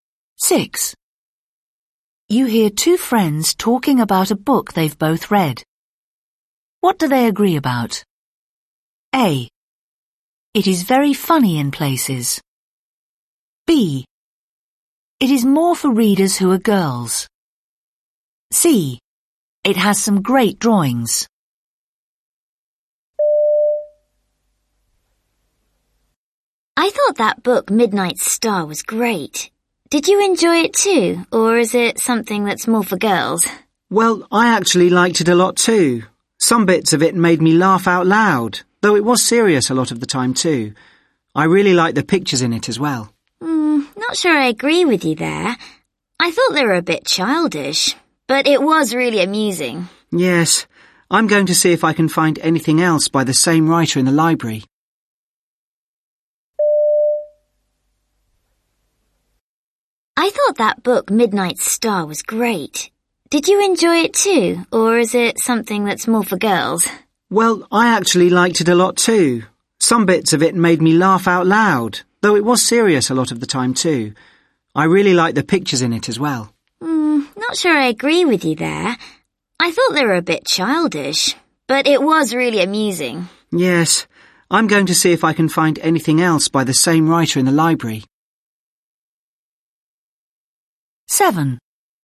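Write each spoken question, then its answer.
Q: What do they agree about?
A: A: It is very funny in places.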